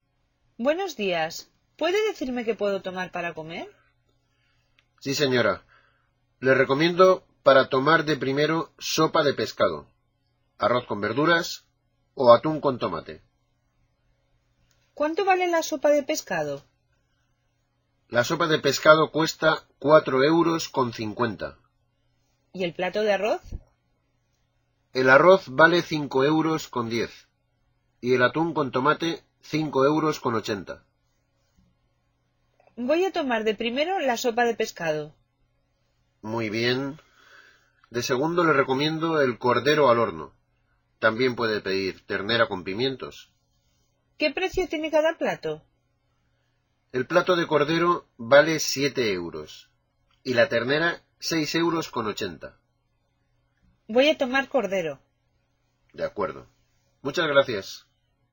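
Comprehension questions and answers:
Listen to a conversation between a waiter and a customer. Write the prices of the dishes in the spaces below. Follow the example.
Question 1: La sopa de pescado: euros.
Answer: 4,50

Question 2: El arroz con verduras: euros.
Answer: 5,10

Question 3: El atún con tomate: euros.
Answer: 5,80

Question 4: El cordero al horno: euros.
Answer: 7

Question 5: La ternera con pimientos: euros.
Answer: 6,80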